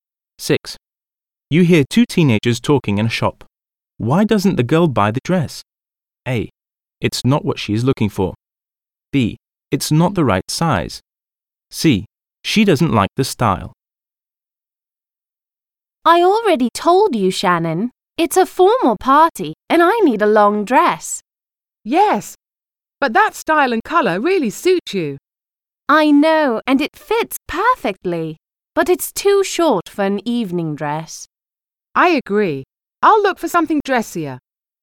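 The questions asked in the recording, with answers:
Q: Why doesn't the girl buy the dress?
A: A: It's not what she is looking for.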